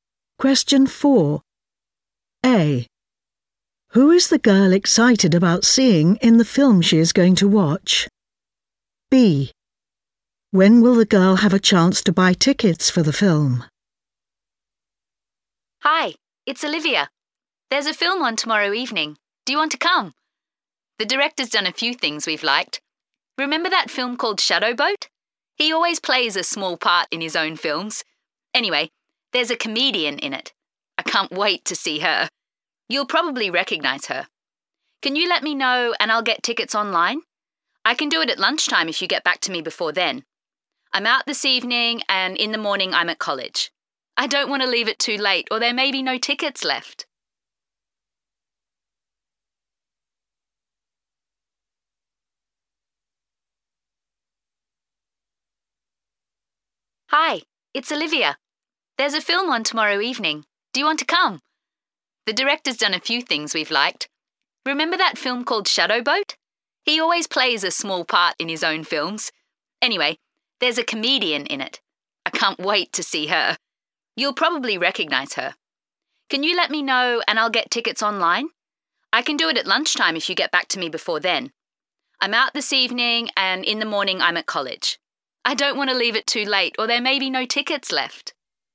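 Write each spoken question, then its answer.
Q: Who is the girl excited about seeing in the film she is going to watch?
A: a comedian

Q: When will the girl have a chance to buy tickets for the film?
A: at lunchtime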